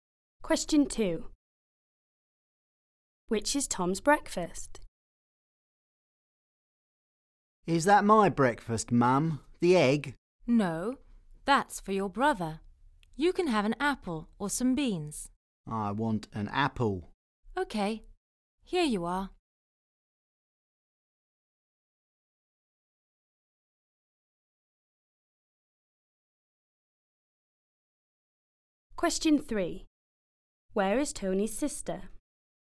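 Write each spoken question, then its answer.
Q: Which is Tom's breakfast?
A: An apple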